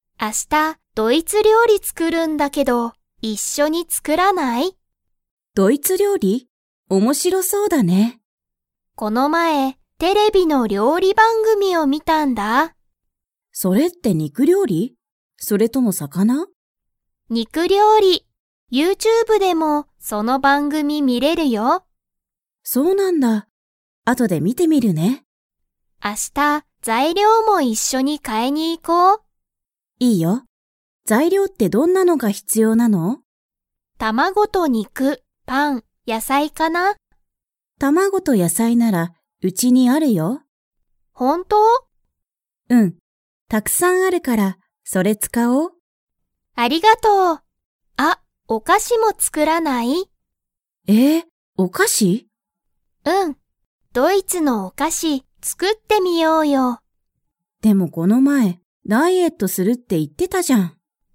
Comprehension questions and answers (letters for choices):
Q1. ともみは を作つくりたい。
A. カフェの料理りょうり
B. アメリカのパン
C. 魚さかな料理りょうり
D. 肉にく料理りょうり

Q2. ともみは、卵たまごと野菜やさいを買かいますか?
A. はい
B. いいえ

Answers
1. D
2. B

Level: Level 4